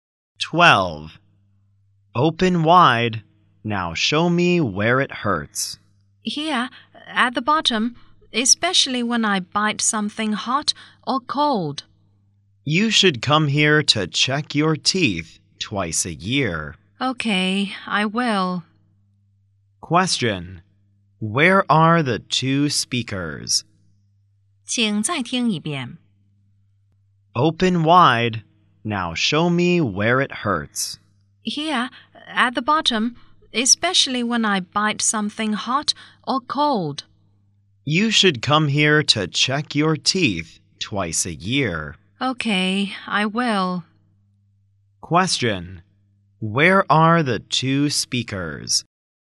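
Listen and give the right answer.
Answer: At a dentist's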